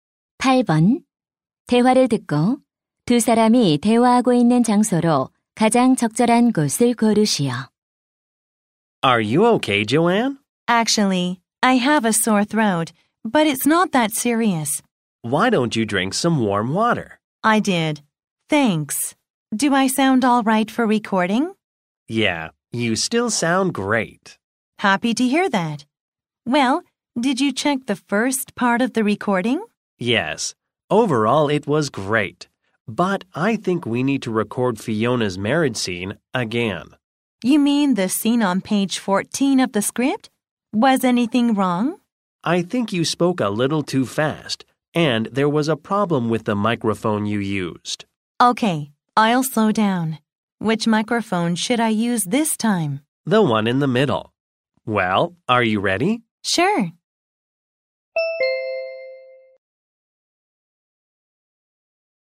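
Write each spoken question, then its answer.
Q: 대화를 듣고 두 사람이 대화하고 있는 장소로 가장 적절한 곳을 고르시오.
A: 녹음실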